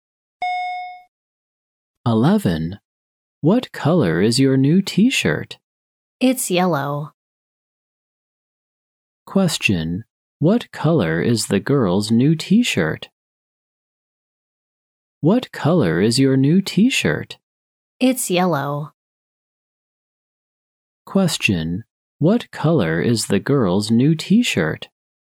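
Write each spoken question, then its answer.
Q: What color is the girl's new T-shirt?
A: Yellow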